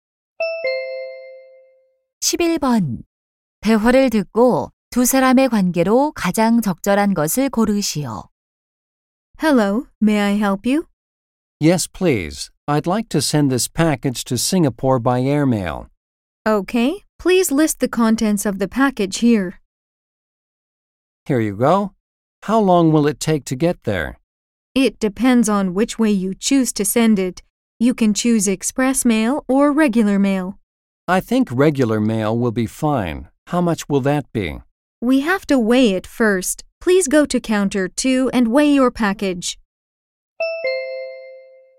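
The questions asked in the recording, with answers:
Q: 대화를 듣고 두 사람의 관계로 가장 적절한 것을 고르시오.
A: 우체국 직원과 고객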